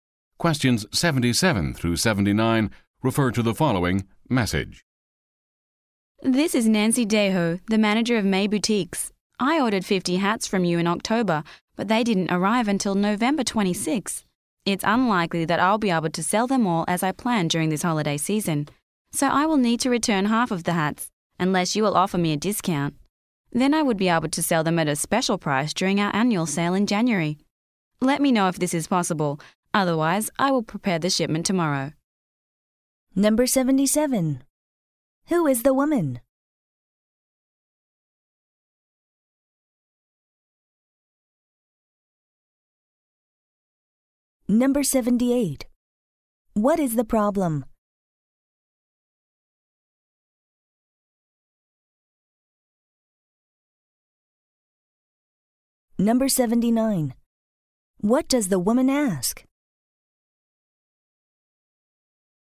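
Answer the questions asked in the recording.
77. The manager of May Boutiques
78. The hats arrived late
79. For a discount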